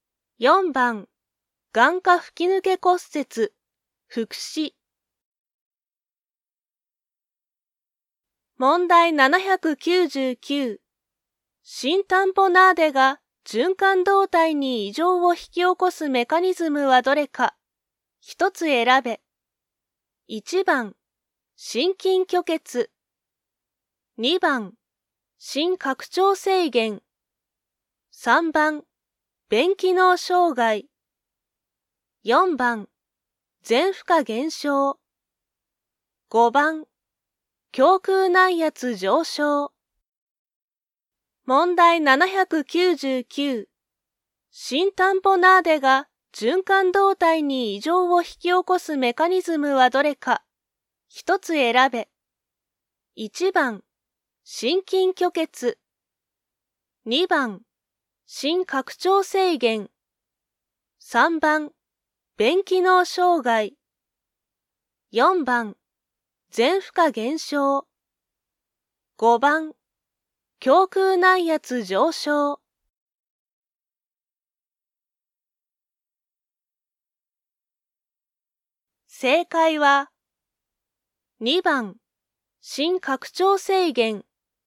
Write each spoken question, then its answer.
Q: 新タンポナーデが循環動態に異常を引き起こすメカニズムはどれか。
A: 正解は、2番、心拡張制限。